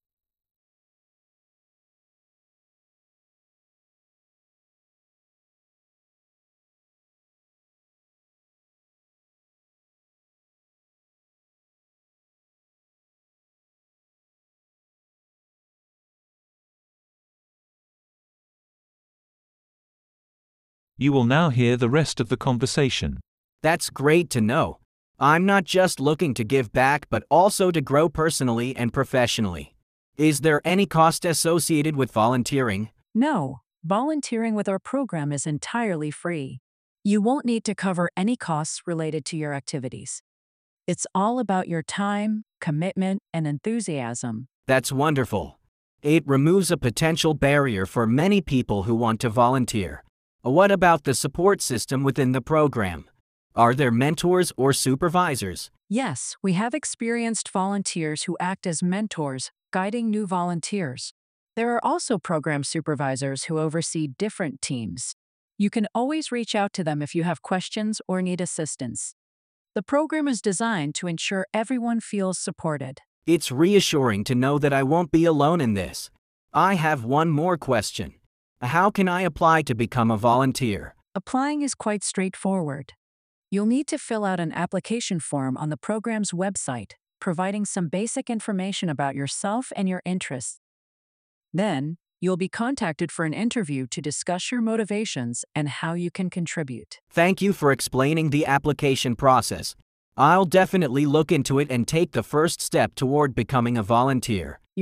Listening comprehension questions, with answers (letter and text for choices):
Instruction: Write no more than three words and/or a number.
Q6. Rafael: What is the cost associated with volunteering in the program?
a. Completely free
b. A small registration fee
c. A monthly subscription fee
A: a. Completely free

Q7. Monica: What do volunteers need to cover when participating in the program?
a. All costs related to activities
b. Their travel expenses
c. Only their time, commitment, and enthusiasm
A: c. Only their time, commitment, and enthusiasm

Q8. Rafael: Are there mentors or supervisors in the program to provide support?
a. No, volunteers work independently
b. Yes, there are experienced volunteers who act as mentors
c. Yes, there are supervisors, but they don't interact with volunteers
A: b. Yes, there are experienced volunteers who act as mentors

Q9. Monica: How can individuals feel supported in the program?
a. There is no support system in place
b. They can reach out to mentors and supervisors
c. Support is only available during specific hours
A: b. They can reach out to mentors and supervisors

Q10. Rafael: How can someone apply to become a volunteer in the program?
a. By sending an email to a specific address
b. By filling out an application form on the program's website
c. By contacting Monica directly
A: b. By filling out an application form on the program's website

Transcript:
I appreciate the mentorship aspect. Is there room for personal growth and development as a volunteer?
Monica: Absolutely. The program encourages personal and professional development. If you show dedication and initiative, you can take on more responsibilities, maybe even lead a project. Plus, there are training opportunities and workshops to enhance your skills.
Rafael: That's great to know. I'm not just looking to give back but also to grow personally and professionally. Is there any cost associated with volunteering?
Monica: No, volunteering with our program is entirely free. You won't need to cover any costs related to your activities. It's all about your time, commitment, and enthusiasm.
Rafael: That's wonderful. It removes a potential barrier for many people who want to volunteer. What about the support system within the program? Are there mentors or supervisors?
Monica: Yes, we have experienced volunteers who act as mentors, guiding new volunteers. There are also program supervisors who oversee different teams. You can always reach out to them if you have questions or need assistance. The program is designed to ensure everyone feels supported.
Rafael: It's reassuring to know that I won't be alone in this. I have one more question. How can I apply to become a volunteer?
Monica: Applying is quite straightforward. You'll need to fill out an application form on the program's website, providing some basic information about yourself and your interests. Then, you'll be contacted for an interview to discuss your motivations and how you can contribute.
Rafael: : Thank you for explaining the application process. I'll definitely look into it and take the first step toward becoming a volunteer.
Monica: You're very welcome, Rafael.